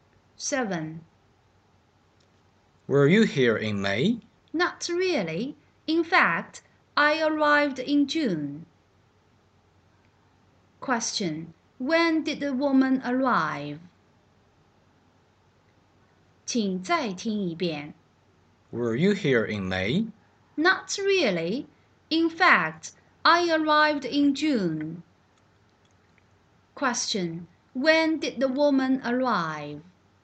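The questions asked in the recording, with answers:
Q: Question: When did the woman arrive?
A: In June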